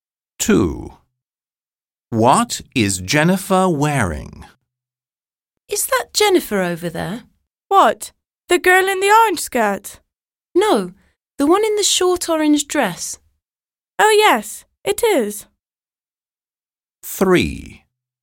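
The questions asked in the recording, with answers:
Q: What is Jennifer wearing?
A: A short orange dress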